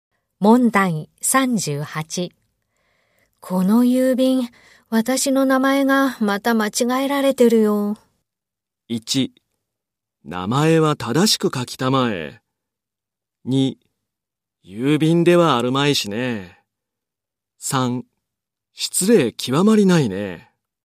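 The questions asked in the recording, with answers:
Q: この郵便、私の名前がまた間違えられてるよ。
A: 3: 失礼極まりないね。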